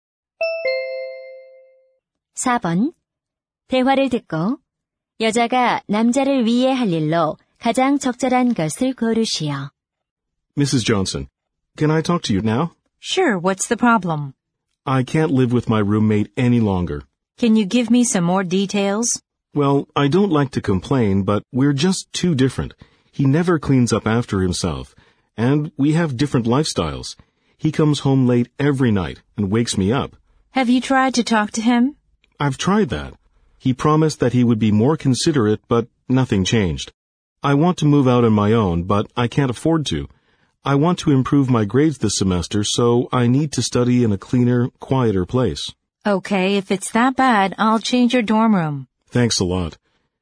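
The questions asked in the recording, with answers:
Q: 대화를 듣고 여자가 남자를 위해 할 일로 가장 적절한 것을 고르시오.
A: 기숙사 방 바꿔 주기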